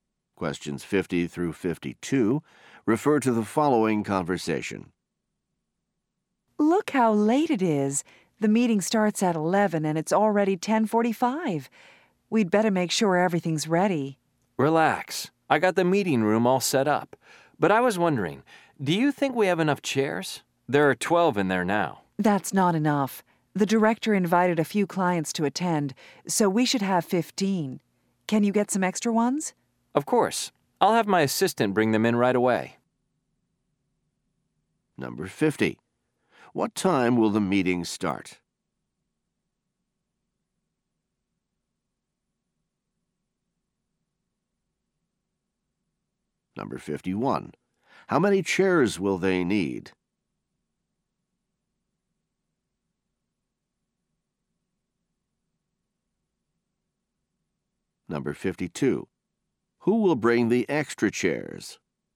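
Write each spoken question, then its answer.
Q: What time will the meeting start?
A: At 11

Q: How many chairs will they need?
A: 15

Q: Who will bring the extra chairs?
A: The assistant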